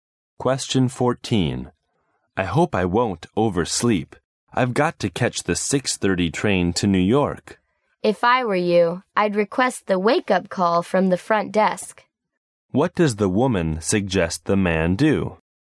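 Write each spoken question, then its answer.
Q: What does the woman suggest the man do?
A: Ask the front desk for a wake-up call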